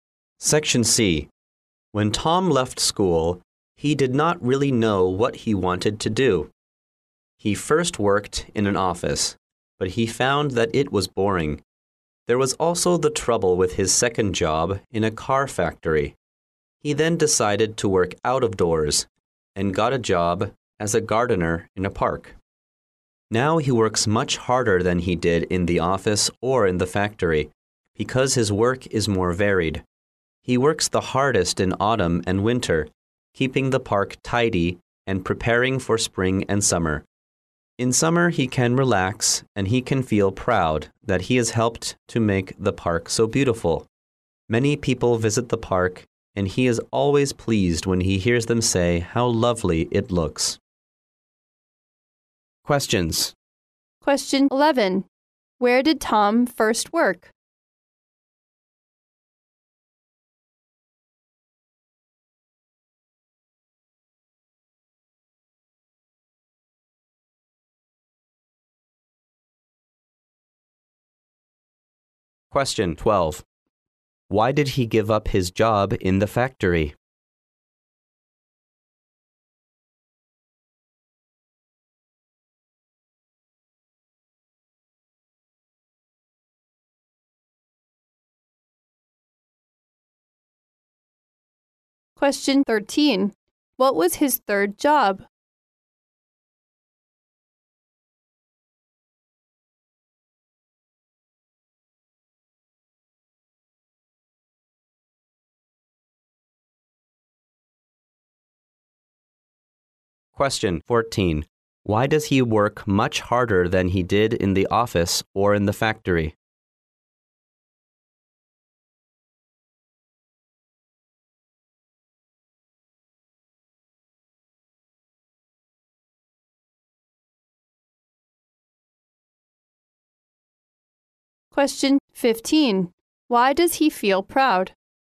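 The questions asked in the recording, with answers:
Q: Where did Tom first work?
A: In an office

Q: What was his third job?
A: A gardener in a park

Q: Why does he work much harder than he did in the office or in the factory?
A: Because his work is more varied

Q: Why does he feel proud?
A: He has helped make the park so beautiful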